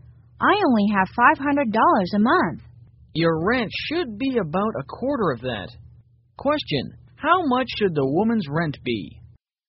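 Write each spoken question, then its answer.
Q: Question, how much should the woman's rent be?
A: $125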